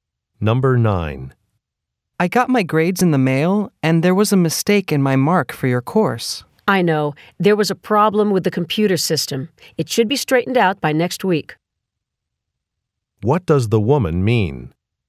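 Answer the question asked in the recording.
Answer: The grade error will be corrected by next week.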